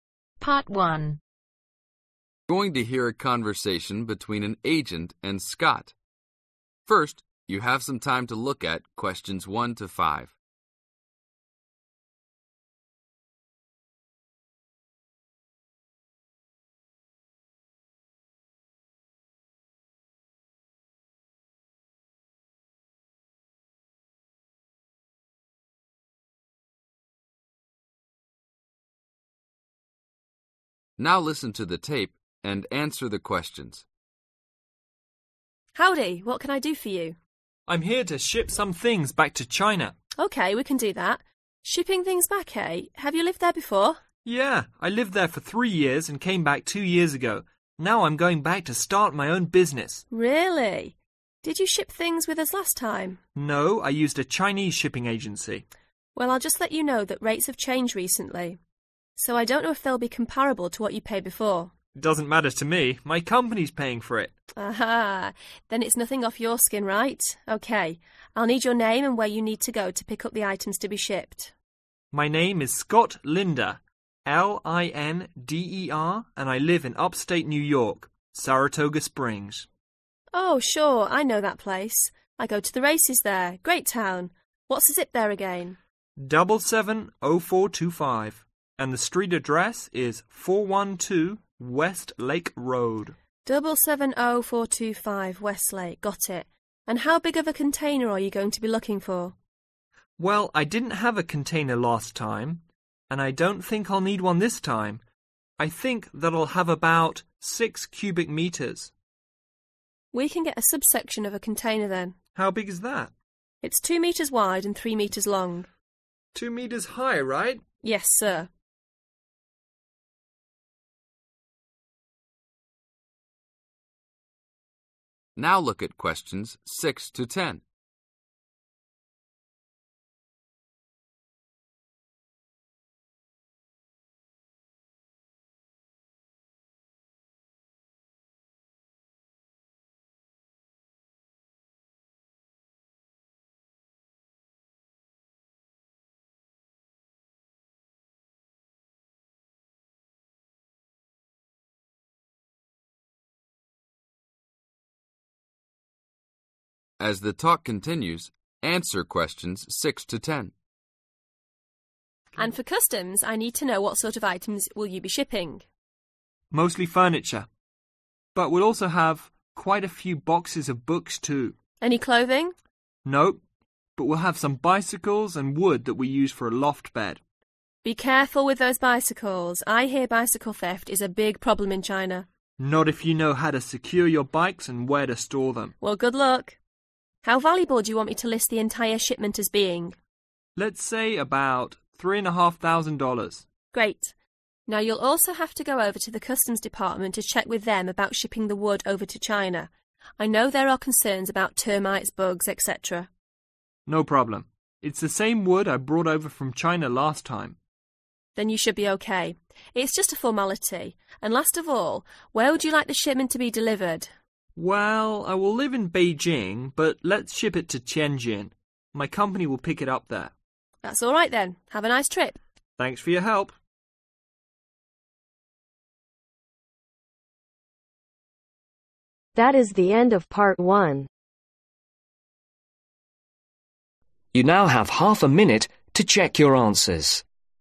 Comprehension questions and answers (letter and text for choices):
Complete the form below. Write NO MORE THAN TWO WORDS OR A NUMBER for each answer.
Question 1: Name: Scott (1)............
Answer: Linder

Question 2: Zip code: (2)............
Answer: 770425

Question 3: Address to be collected from: 412 (3)............ Road.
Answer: West Lake

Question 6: Items being shipped: (6)...........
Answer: Furniture

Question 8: Total estimated value: (8)............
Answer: $3,500

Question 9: What is Scott not worried about ?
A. not clearing customs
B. having his bicycles stolen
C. the amount of clothing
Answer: B. having his bicycles stolen

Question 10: Who will pick up the shipment ?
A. a shipping company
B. Scott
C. a company employee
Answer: C. a company employee